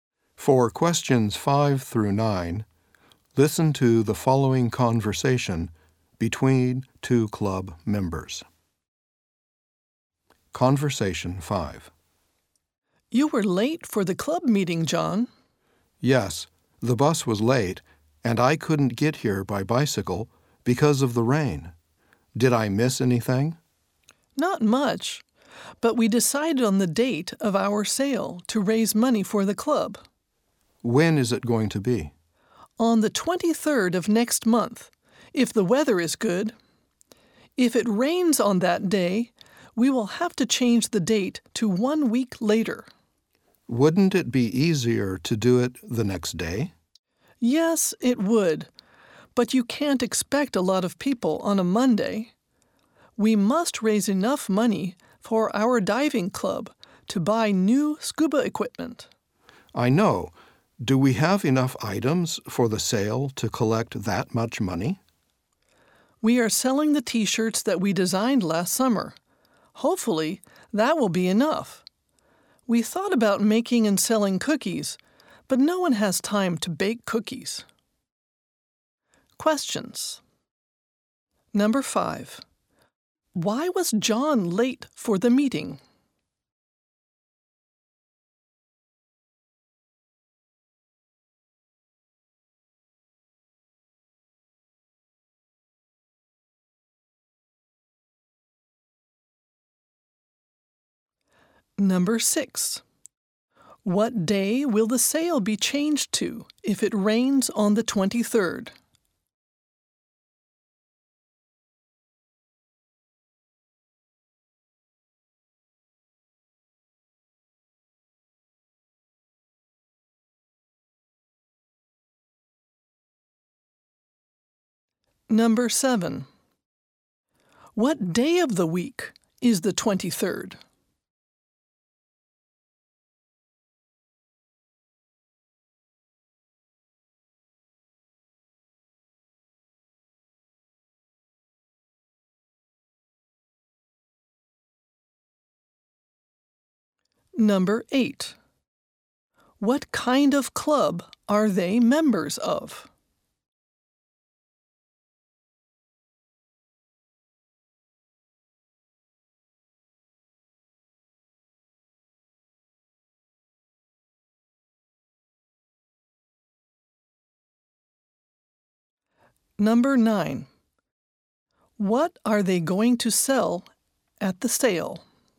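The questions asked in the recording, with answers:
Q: Why was John late for the meeting?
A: The bus was late.

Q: What day will the sail be changed to if it rains on the 23rd?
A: The 30th (one week later)

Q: What day of the week is the 23rd?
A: Sunday

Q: What kind of club are they members of?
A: A diving club

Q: What are they going to sell at the sale?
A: T-shirts they designed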